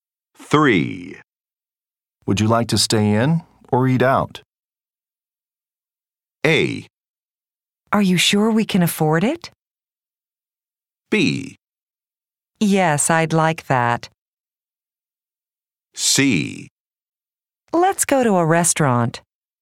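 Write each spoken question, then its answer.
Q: Would you like to stay in or eat out?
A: C: Let's go to a restaurant.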